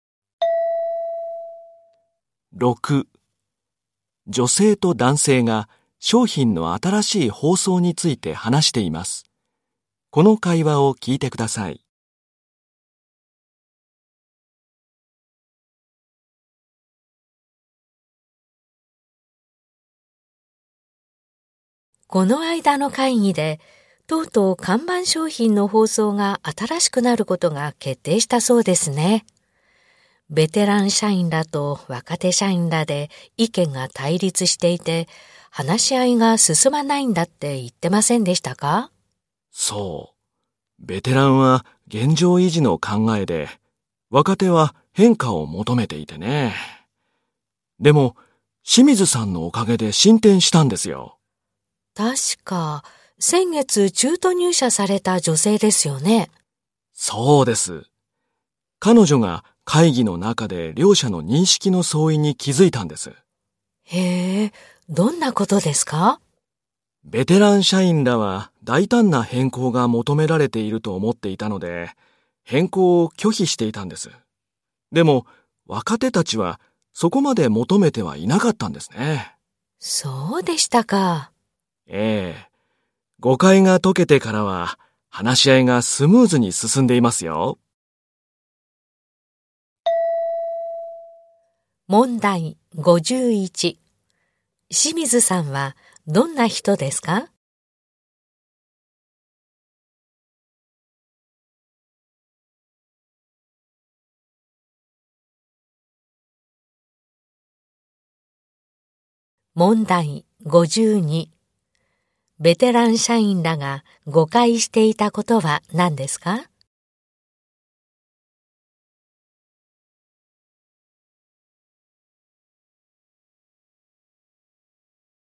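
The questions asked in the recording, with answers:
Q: ベテラン社員らが誤解していたことは何ですか?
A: 大胆な変更が求められていると思っていたこと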